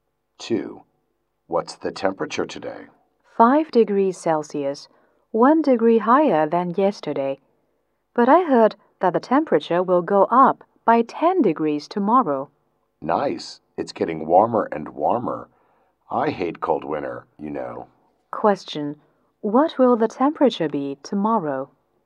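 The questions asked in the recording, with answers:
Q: What will the temperature be tomorrow?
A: 15 degrees Celsius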